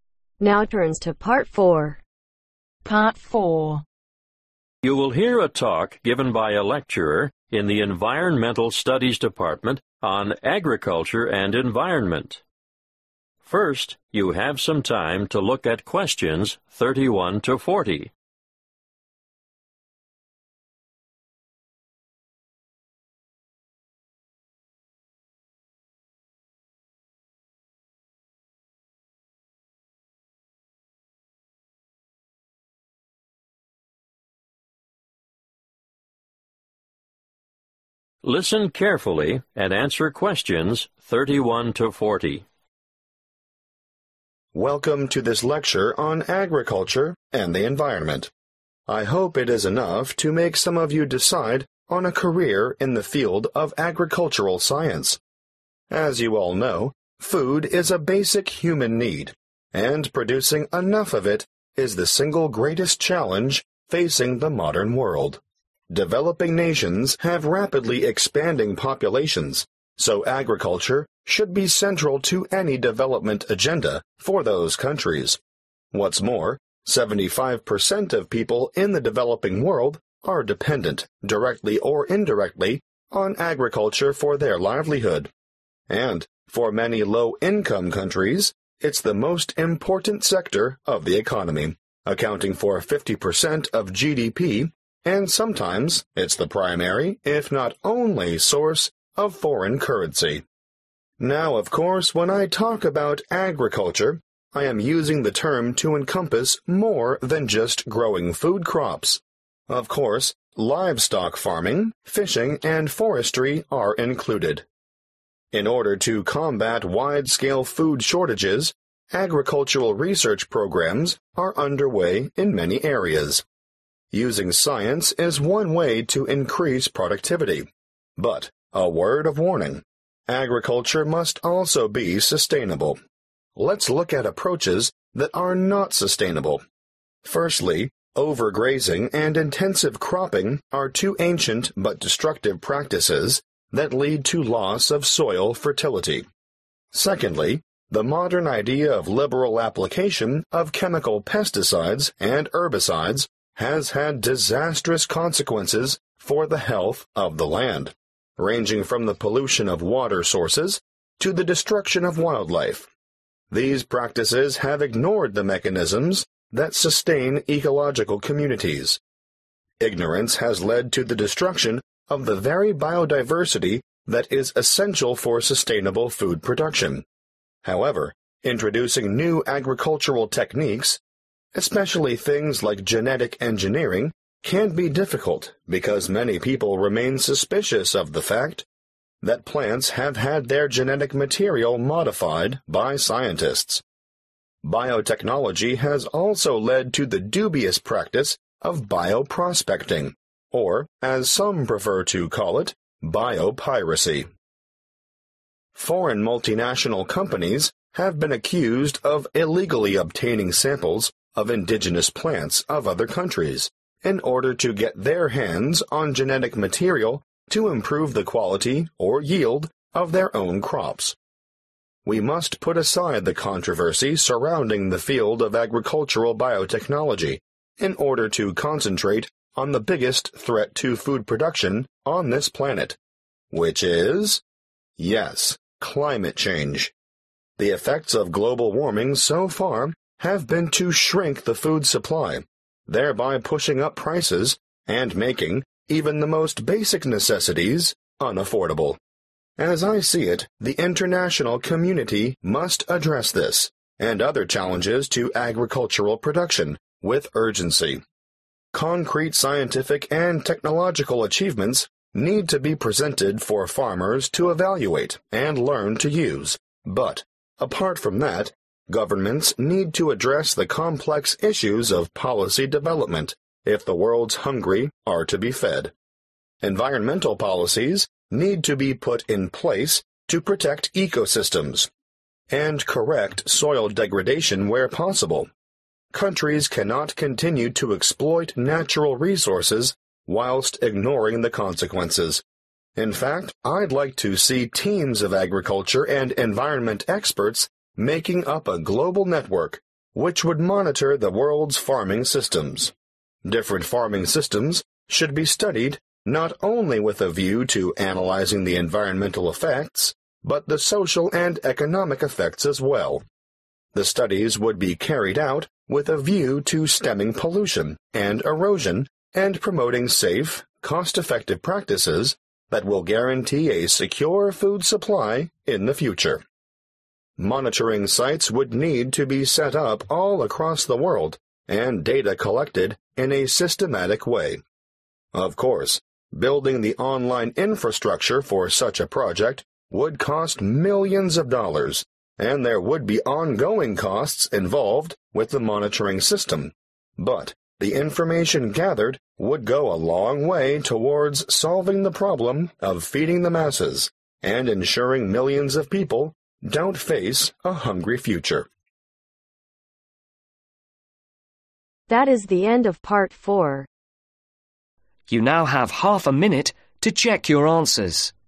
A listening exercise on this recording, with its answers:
Complete the notes below. Write ONE WORD ONLY for each answer.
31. (31) ............ production = biggest problem in today's world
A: Food

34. Agriculture must be sustainable: old methods, & new, chemical methods are all unsustainable the (34) ............ of biodiversity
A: Destruction

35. biotechnology * GM or GE * bio prospecting (bio-piracy) i.e. large companies steal samples of native plants to use the (35) ............ material for their own crop improvement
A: Genetic

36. (36) ............ change is responsible for less food and higher prices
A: Climate

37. Farmers need to be educated but government also need to pay attention to (37) ............ development in order to protect the environment and re-nourish the soil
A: Policy

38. Experts from around the world could come together to form a (38) ............ network to observe farm systems aiming to prevent pollution and erosion and encourage safe procedures that are also (39) ............ effective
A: Global

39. Experts from around the world could come together to form a (38) ............ network to observe farm systems aiming to prevent pollution and erosion and encourage safe procedures that are also (39) ............ effective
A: Cost

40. Creating the project's online (40) ............ would be very expensive and more money would be needed for the monitoring system but it could solve the problem of food shortages.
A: Infrastructure